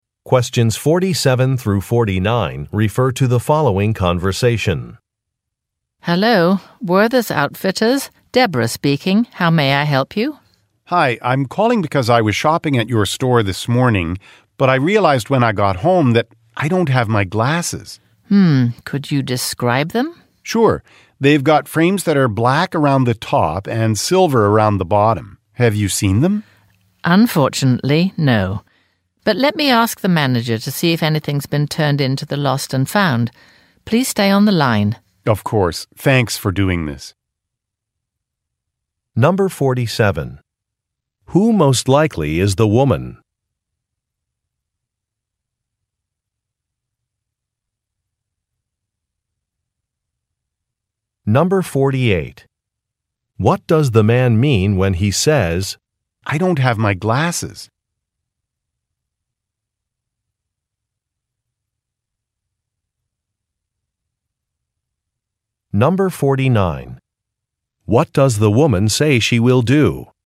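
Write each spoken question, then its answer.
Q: Who most likely is the woman?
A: A store employee

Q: What does the man mean when he says, "I don't have my glasses"?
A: He left his glasses behind at the store

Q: What does the woman say she will do?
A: Ask the manager about the lost and found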